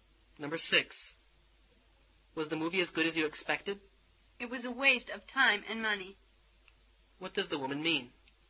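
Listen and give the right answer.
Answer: The movie was very disappointing.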